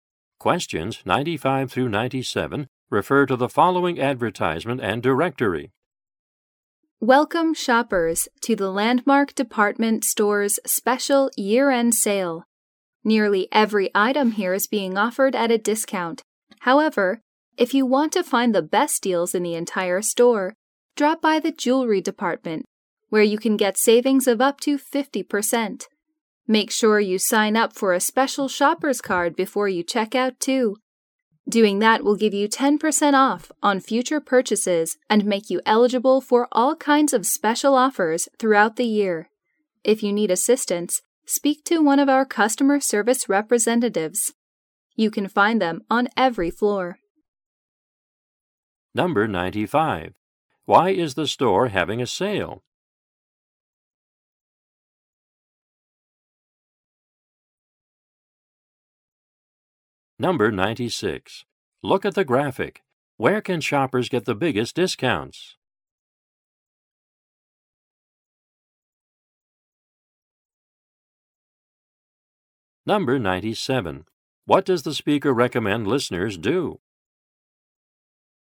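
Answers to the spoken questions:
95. It is a year-end sale
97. Sign up for a special shopper's card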